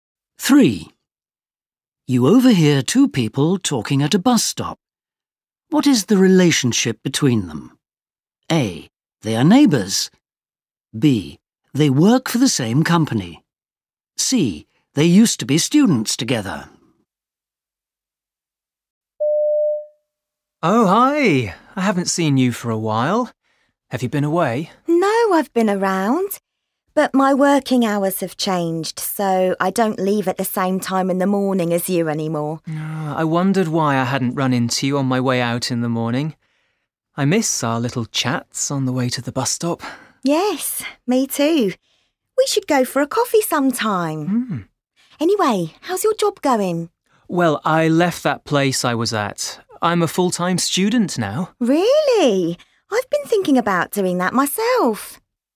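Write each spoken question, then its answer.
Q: What is the relationship between them?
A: A: They are neighbours.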